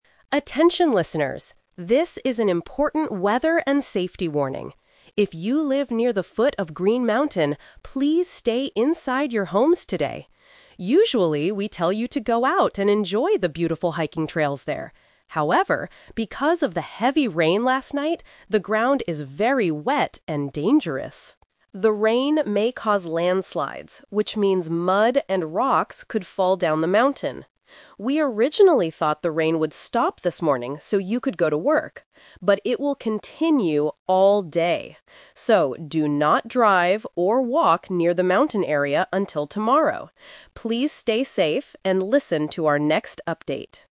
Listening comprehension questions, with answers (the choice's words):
Listen to a radio announcer giving a weather warning. Choose the correct answer (A, B, or C) for each question.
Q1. Who is this warning for?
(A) People living near the foot of the mountain.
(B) People living next to a large river.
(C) People working in the city center.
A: People living near the foot of the mountain.

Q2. What does the announcer tell people to do today?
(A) Enjoy the beautiful hiking trails.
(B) Stay inside their homes.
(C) Drive to work carefully.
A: Stay inside their homes.

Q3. What did the radio station originally think about the rain?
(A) They thought it would stop this morning.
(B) They thought it would continue all day.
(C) They thought it would change into snow.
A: They thought it would stop this morning.

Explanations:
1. Why A is correct: The announcer explicitly says, "If you live near the foot of Green Mountain..." Why B & C are wrong: A river and the city center are not mentioned in the bulletin at all.
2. Why B is correct: The announcer gives a clear instruction: "please stay inside your homes today." Why A is a trap: The announcer says they usually tell people to enjoy the trails, but not today. This uses the A2 contrast between habit and present situation. Why C is a trap: The announcer explicitly says "do not drive" and mentions that people cannot go to work because the rain won't stop.
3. Why A is correct: The audio states: "We originally thought the rain would stop this morning..." Why B is a trap: The rain will continue all day, but that is the actual current situation, not what they originally thought would happen. (This is the A2 Twist). Why C is wrong: Snow is never mentioned in the warning.

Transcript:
Announcer: Attention listeners. This is an important weather and safety warning. If you live near the foot of Green Mountain, please stay inside your homes today. Usually, we tell you to go out and enjoy the beautiful hiking trails there. However, because of the heavy rain last night, the ground is very wet and dangerous. The rain may cause landslides, which means mud and rocks could fall down the mountain. We originally thought the rain would stop this morning, so you could go to work. But it will continue all day. So, do not drive or walk near the mountain area until tomorrow. Please stay safe and listen to our next update.